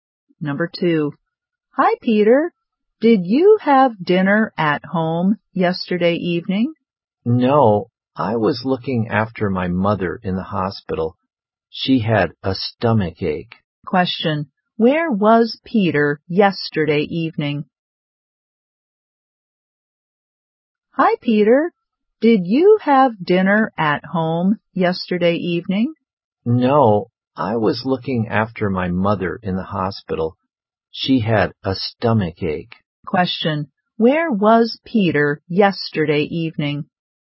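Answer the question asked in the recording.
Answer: In the hospital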